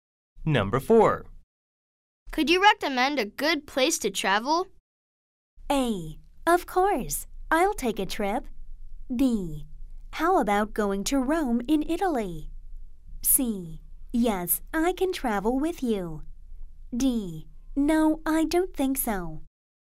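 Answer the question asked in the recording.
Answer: B: How about going to Rome in Italy?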